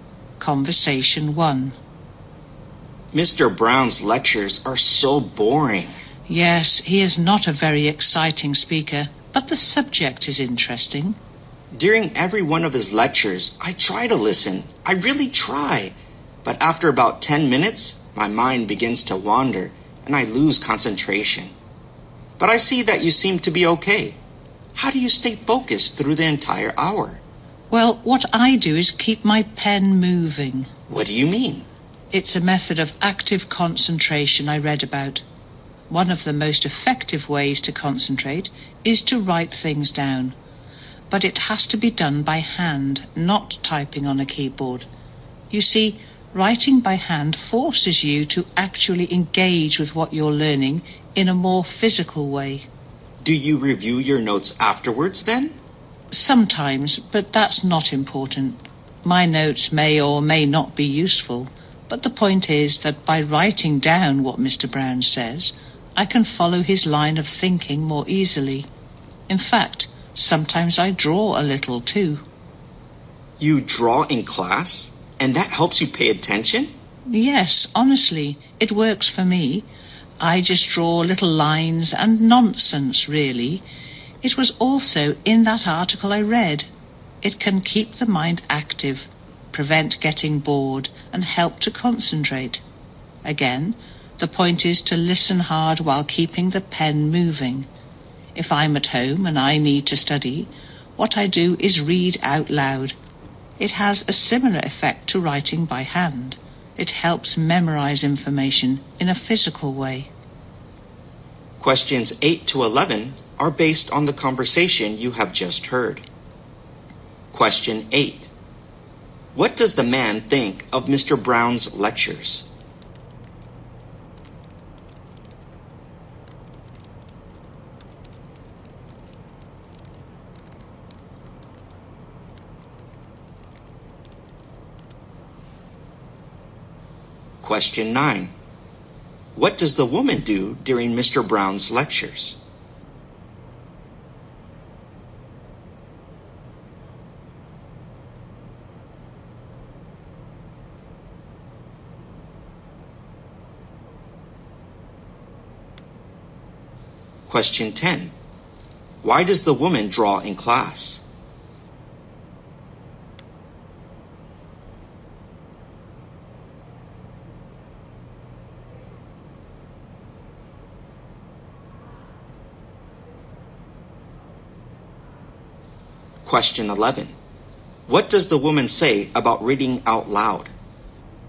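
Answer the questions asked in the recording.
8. They are boring
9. She keeps her pen moving by writing notes by hand
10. It keeps her mind active and helps her concentrate
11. It helps her memorize information, like writing by hand does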